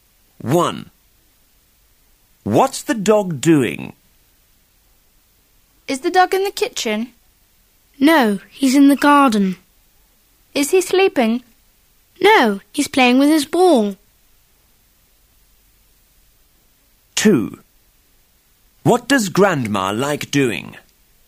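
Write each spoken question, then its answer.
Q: What's the dog doing?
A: Playing with his ball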